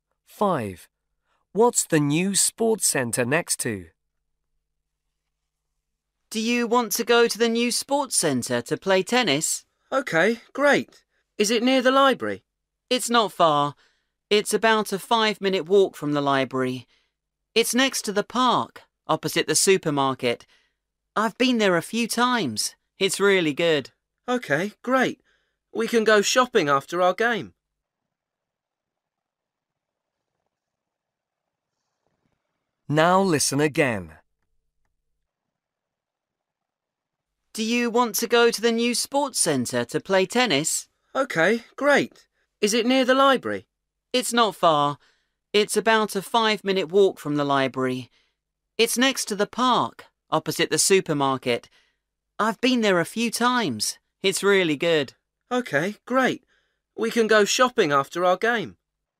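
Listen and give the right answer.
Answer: the park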